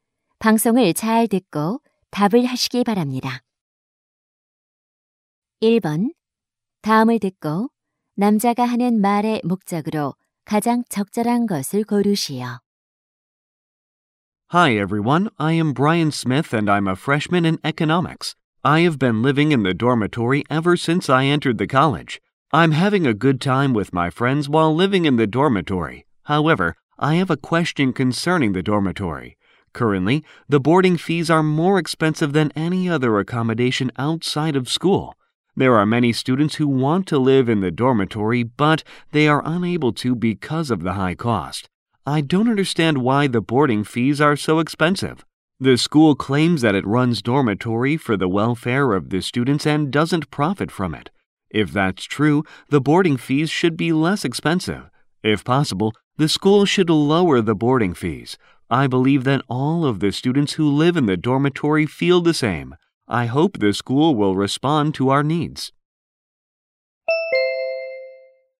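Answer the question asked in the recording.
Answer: 기숙사비 인하를 요청하려고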